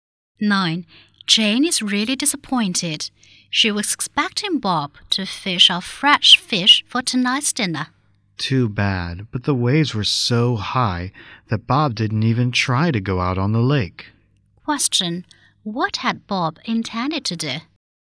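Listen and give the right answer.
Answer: Go fishing on the lake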